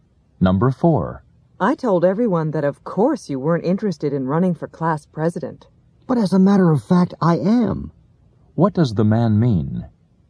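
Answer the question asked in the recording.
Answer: He is interested in running for class president.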